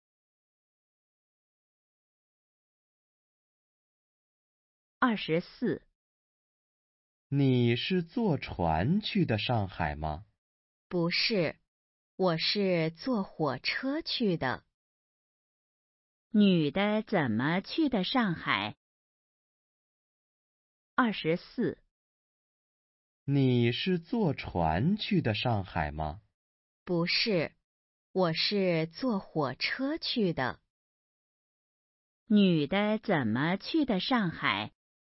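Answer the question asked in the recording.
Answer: 坐火车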